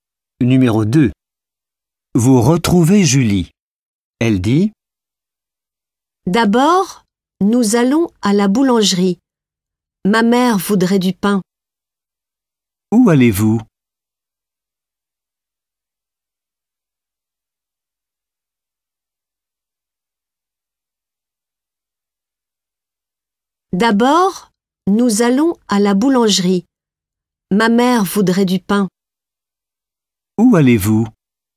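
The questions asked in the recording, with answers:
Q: Où allez-vous?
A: À la boulangerie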